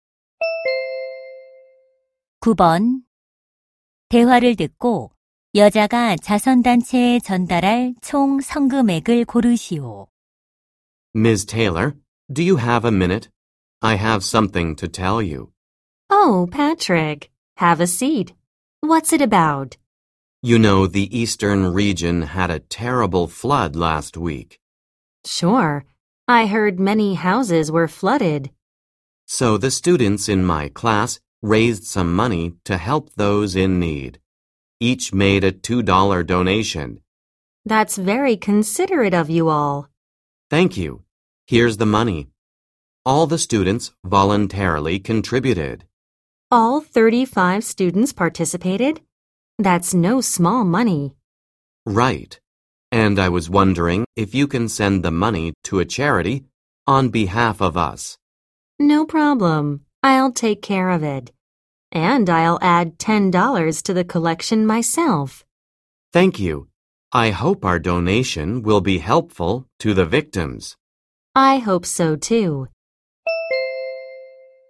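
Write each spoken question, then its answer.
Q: 대화를 듣고 여자가 자선단체에 전달할 총 성금액을 고르시오.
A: 80달러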